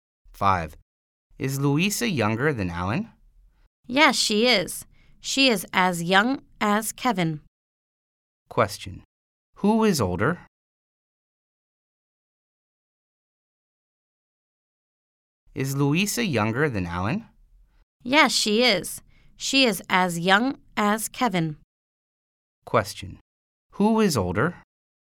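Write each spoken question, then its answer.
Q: Question. Who is older?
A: Alan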